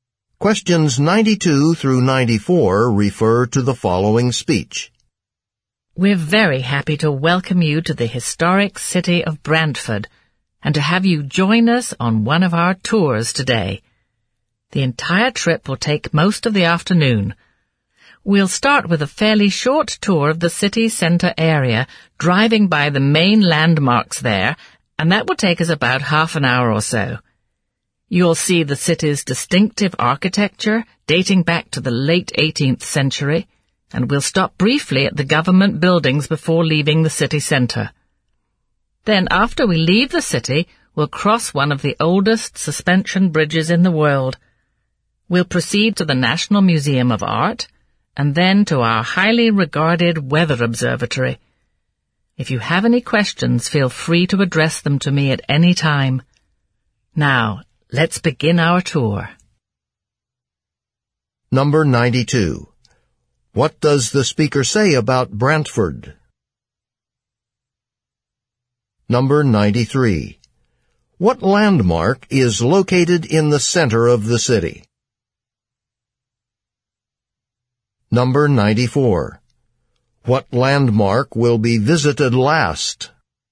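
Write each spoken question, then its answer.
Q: What landmark will be visited last?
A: The weather observatory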